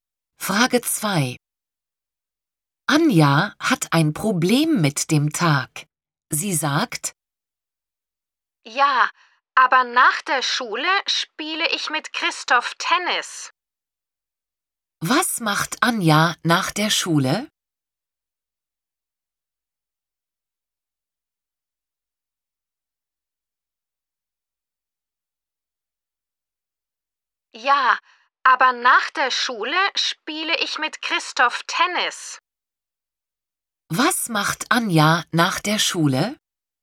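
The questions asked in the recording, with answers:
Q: Was macht Anja nach der Schule?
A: Sie spielt mit Christoph Tennis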